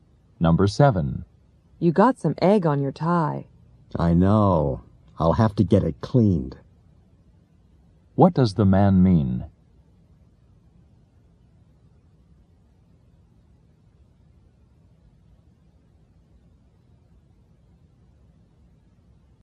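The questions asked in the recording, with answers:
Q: What does the man mean?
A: He will have his tie cleaned.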